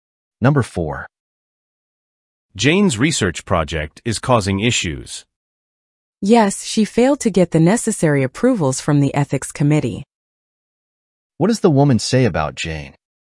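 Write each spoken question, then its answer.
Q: What does the woman say about Jane?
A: She failed to get the ethics committee's approvals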